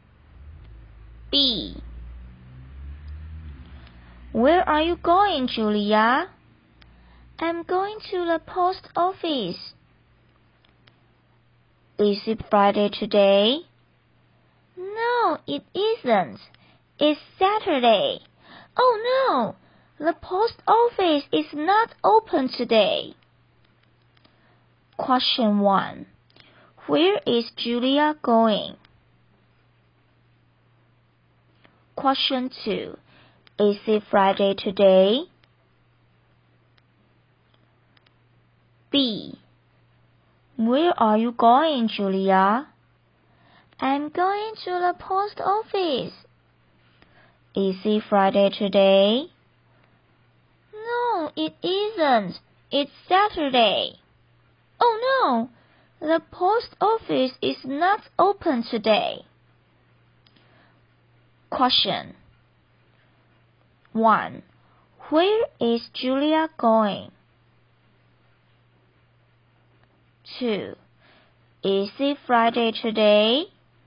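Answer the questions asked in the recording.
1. To the post office.
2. No, it isn't. It's Saturday.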